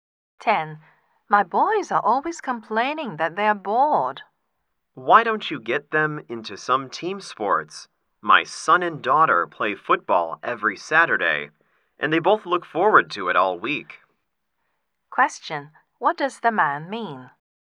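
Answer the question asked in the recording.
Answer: Team sports would keep the boys from being bored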